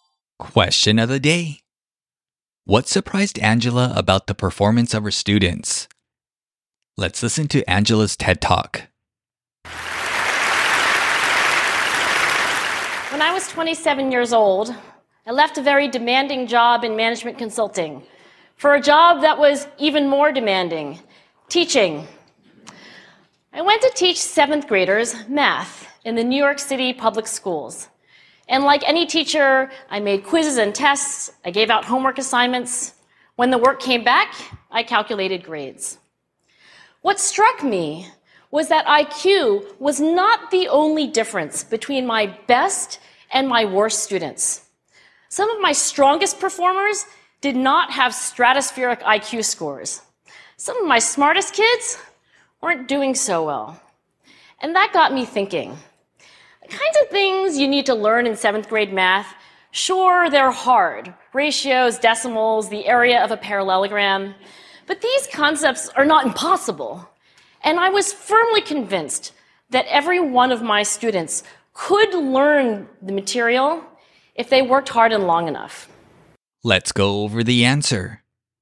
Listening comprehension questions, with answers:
質問の答えを考えましょう。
What surprised Angela about the performance of her students?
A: She was surprised that IQ was not the only factor determining the difference between their best and worst students.

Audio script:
What struck me was that IQ was not the only difference between my best and my worst students. Some of my strongest performers did not have stratospheric IQ scores. Some of my smartest kids weren't doing so well. And that got me thinking. The kinds of things you need to learn in seventh-grade math, sure, they're hard: ratios, decimals, the area of a parallelogram. But these concepts are not impossible, and I was firmly convinced that every one of my students could learn the material if they worked hard and long enough.